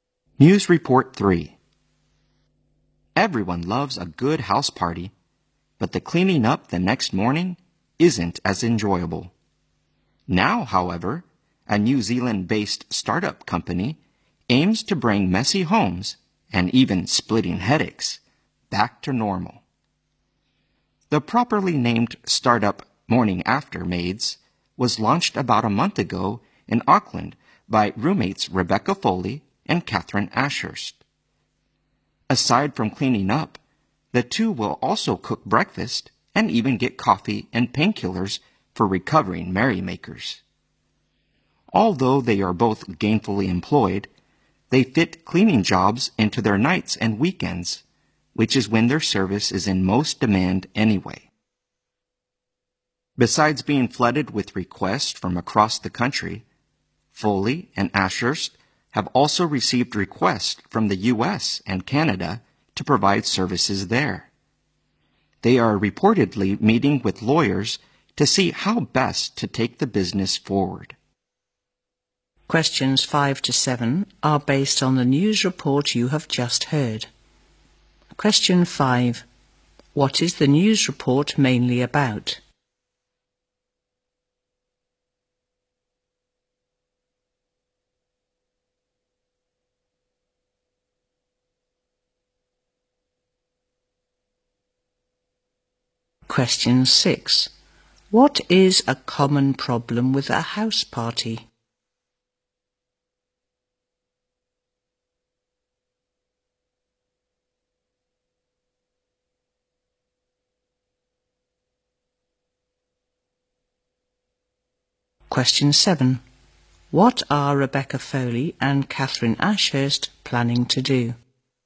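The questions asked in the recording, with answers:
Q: What is the news report mainly about?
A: A startup, Morning After Maids, that cleans up homes after house parties.

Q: What is a common problem with a house party?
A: Cleaning up the next morning.

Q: What are Rebecca Foley and Catherine Ashurst planning to do?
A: Meet with lawyers to see how best to take the business forward.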